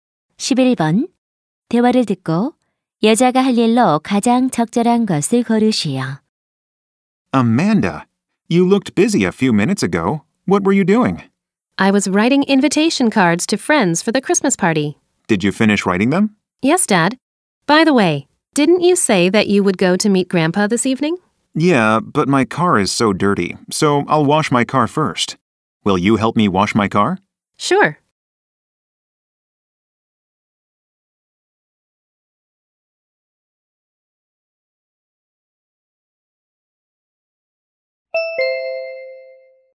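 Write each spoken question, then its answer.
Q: 대화를 듣고 여자가 할 일로 가장 적절한 것을 고르시오.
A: 아빠의 세차 돕기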